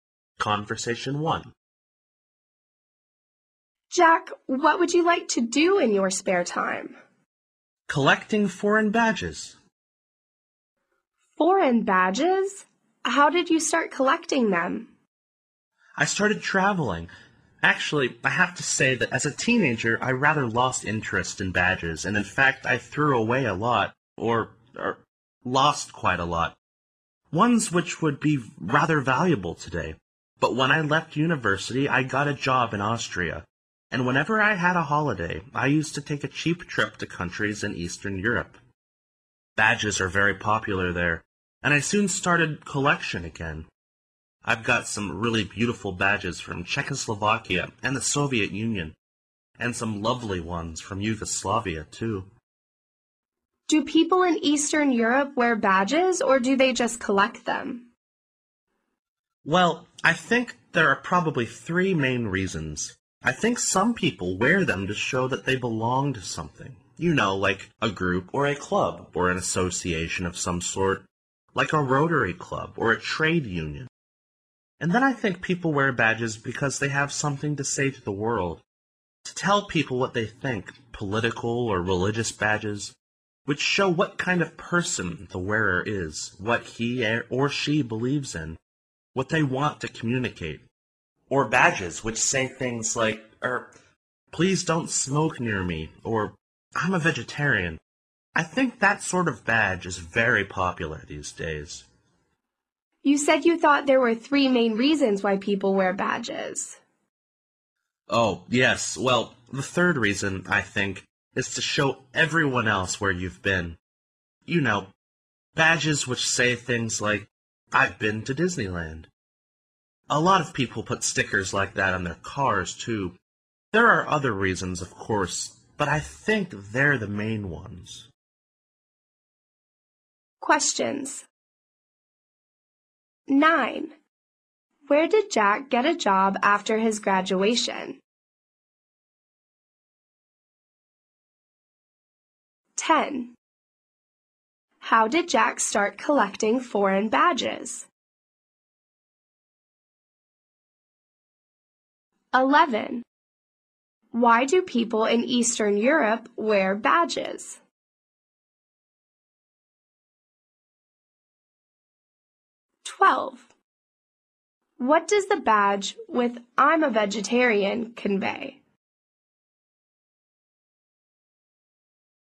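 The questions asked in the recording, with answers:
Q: Where did Jack get a job after his graduation?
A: In Austria

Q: How did Jack start collecting foreign badges?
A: By traveling to Eastern Europe on holidays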